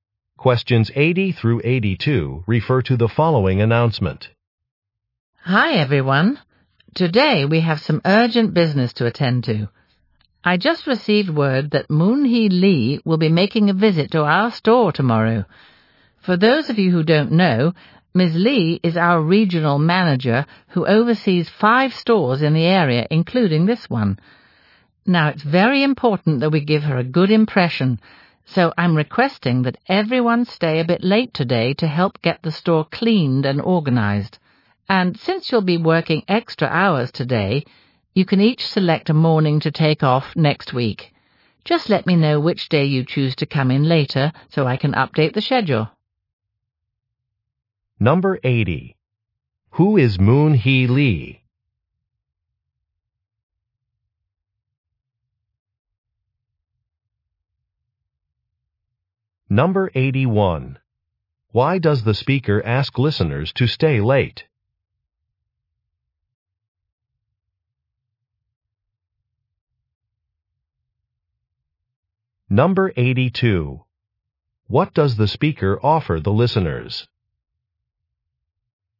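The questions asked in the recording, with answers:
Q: Who is Moon Hee Lee?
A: The regional manager.

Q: Why does the speaker ask listeners to stay late?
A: To clean and organize the store before the manager's visit.

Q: What does the speaker offer the listeners?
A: A morning off next week.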